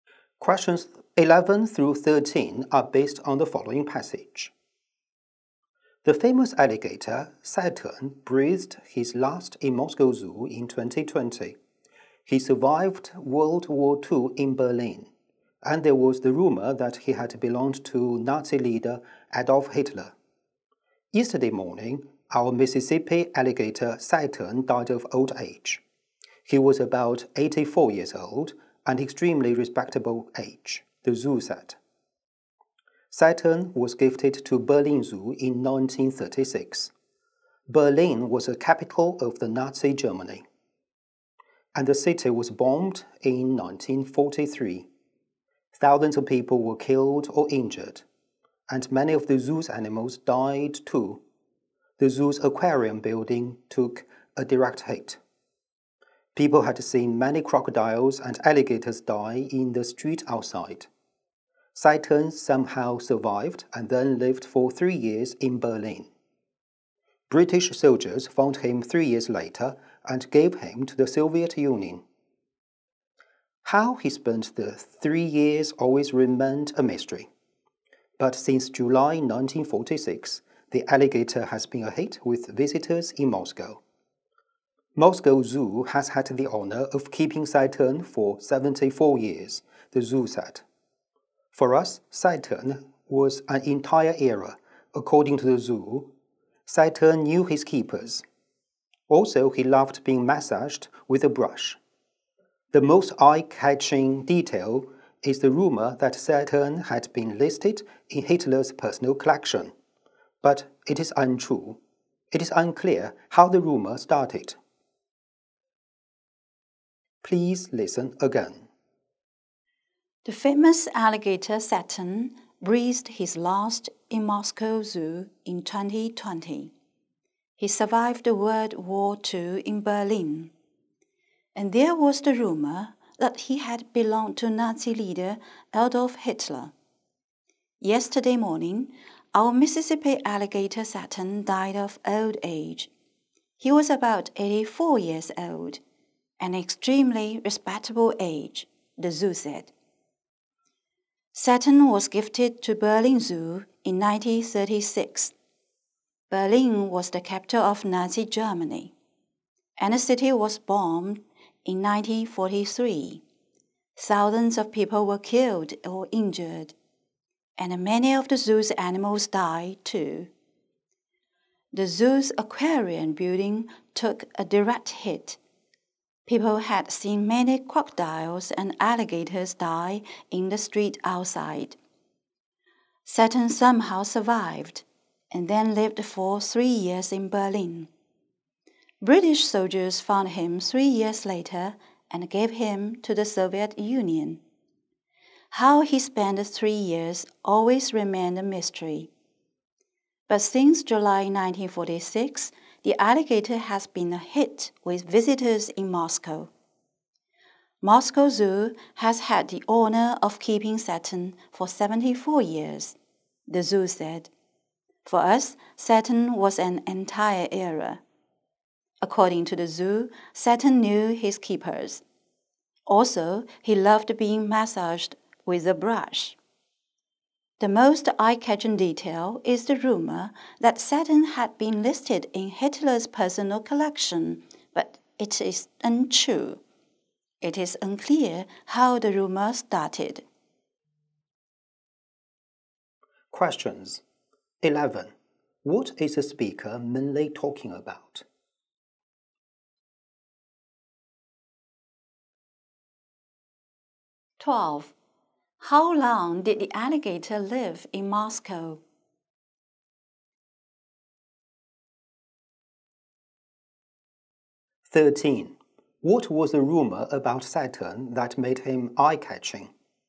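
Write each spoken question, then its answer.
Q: What is the speaker mainly talking about?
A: The death of the famous alligator Saturn

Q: How long did the alligator live in Moscow?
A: 74 years

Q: What was the rumor about Saturn that made him eye-catching?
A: That he had belonged to Hitler's personal collection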